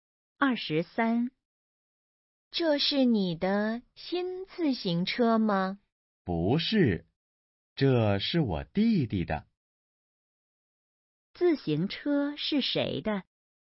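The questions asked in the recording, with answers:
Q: 自行车是谁的?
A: 弟弟的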